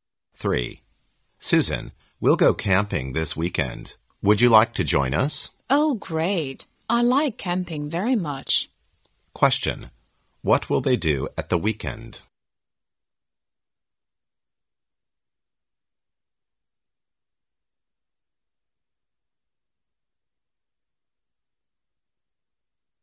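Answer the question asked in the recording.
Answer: Go camping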